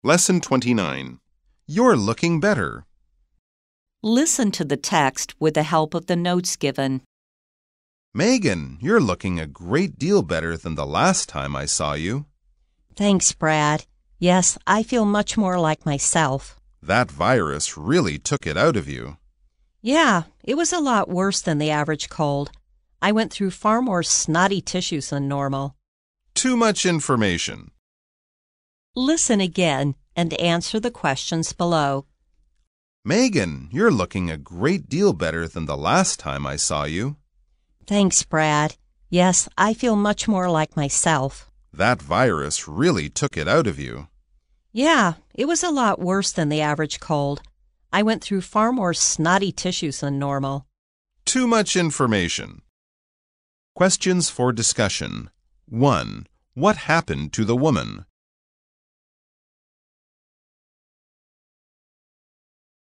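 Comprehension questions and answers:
Listen again and answer the questions below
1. What happened to the woman?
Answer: She had a virus, a bad cold.

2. Is the woman feeling better?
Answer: Yes, she feels much more like herself.

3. Does the woman think the cold was worse than usual?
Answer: Yes, it was a lot worse than the average cold.

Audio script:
A Megan, you're looking a great deal better than the last time I saw you!
B Thanks, Brad. Yes, I feel much more like myself.
A That virus really took it out of you.
B Yeah, it was a lot worse than the average cold. I went through far more snotty tissues than normal.
A Too much information!

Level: 中階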